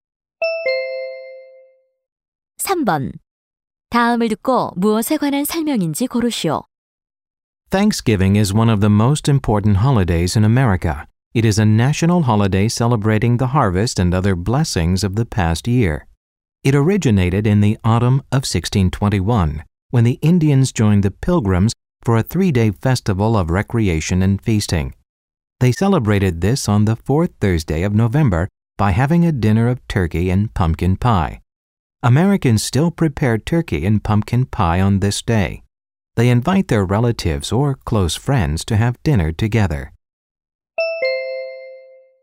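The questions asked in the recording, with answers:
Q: 다음을 듣고 무엇에 관한 설명인지 고르시오.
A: 추수감사절 (Thanksgiving)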